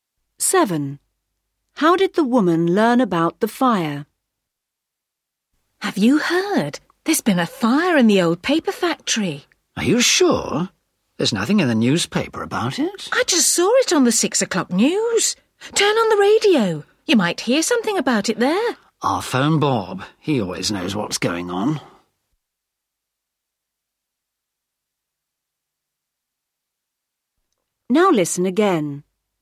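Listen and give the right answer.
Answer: From the TV news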